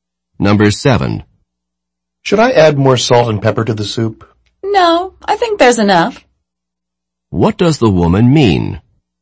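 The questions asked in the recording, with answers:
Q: What does the woman mean?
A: The soup doesn't need more salt and pepper.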